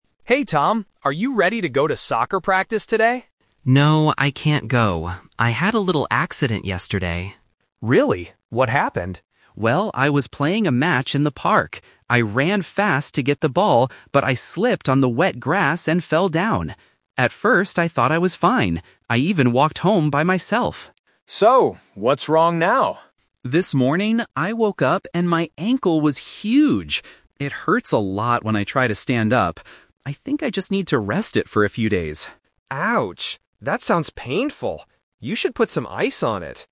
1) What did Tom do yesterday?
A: He fell down while playing a game in the park.

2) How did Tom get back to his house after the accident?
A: He walked home.

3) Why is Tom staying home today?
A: Because his ankle is swollen and painful.

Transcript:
Younger Brother: Hey Tom, are you ready to go to soccer practice today?
Older Brother: No, I can't go. I had a little accident yesterday.
Younger Brother: Really? What happened?
Older Brother: Well, I was playing a match in the park. I ran fast to get the ball, but I slipped on the wet grass and fell down. At first, I thought I was fine. I even walked home by myself.
Younger Brother: So, what's wrong now?
Older Brother: This morning, I woke up and my ankle was huge! It hurts a lot when I try to stand up. I think I just need to rest it for a few days.